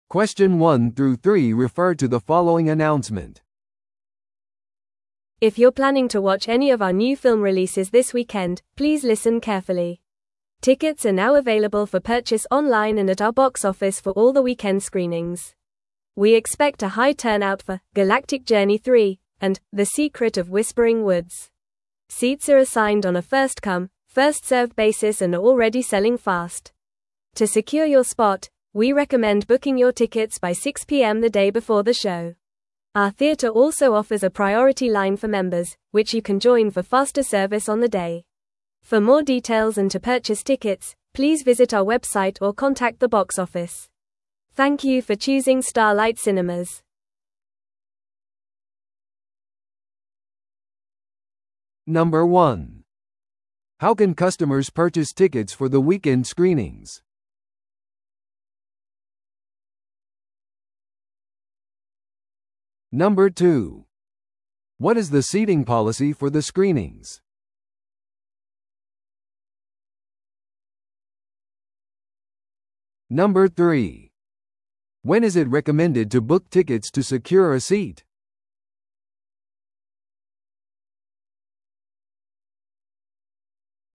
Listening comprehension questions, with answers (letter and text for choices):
Listen to the audio below and answer the questions.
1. How can customers purchase tickets for the weekend screenings?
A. 上映当日にボックスオフィスでのみ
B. 抽選システムによって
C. オンラインまたはボックスオフィスで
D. カスタマーサービスラインに電話して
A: C. オンラインまたはボックスオフィスで

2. What is the seating policy for the screenings?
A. 席はVIP専用です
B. 席は1週間前から予約可能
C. 席は年齢層によって割り当てられる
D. 席は先着順で割り当てられる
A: D. 席は先着順で割り当てられる

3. When is it recommended to book tickets to secure a seat?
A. 上映1ヶ月前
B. 上映当日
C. 上映前日の6pmまでに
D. チケットが発売された同じ日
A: C. 上映前日の6pmまでに

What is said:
If you're planning to watch any of our new film releases this weekend, please listen carefully. Tickets are now available for purchase online and at our box office for all the weekend screenings. We expect a high turnout for 'Galactic Journey 3' and 'The Secret of Whispering Woods'. Seats are assigned on a first-come, first-served basis and are already selling fast. To secure your spot, we recommend booking your tickets by 6pm the day before the show. Our theater also offers a priority line for members, which you can join for faster service on the day. For more details and to purchase tickets, please visit our website or contact the box office. Thank you for choosing Starlight Cinemas.